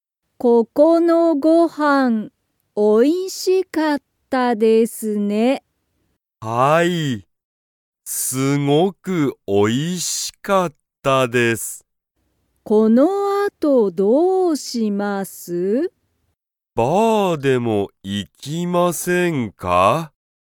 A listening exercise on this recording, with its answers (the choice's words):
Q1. ここのご飯(はん)は____。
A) おいしかった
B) 大変(たいへん)だった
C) おいしくない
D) 大変(たいへん)じゃない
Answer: おいしかった

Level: Level 1